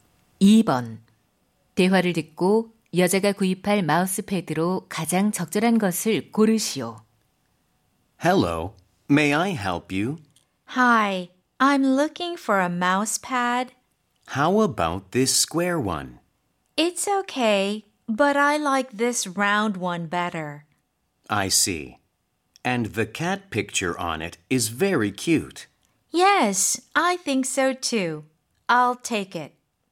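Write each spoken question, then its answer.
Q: 대화를 듣고 여자가 구입할 마우스패드로 가장 적절한 것을 고르시오.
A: 고양이 그림이 있는 둥근 마우스패드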